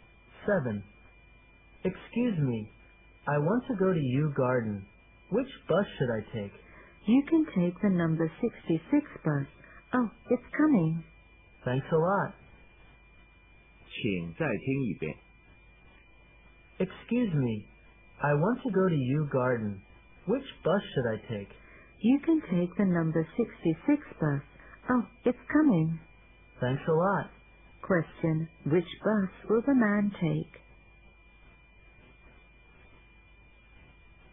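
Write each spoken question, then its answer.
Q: Question, which bus will the man take?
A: The number 66 bus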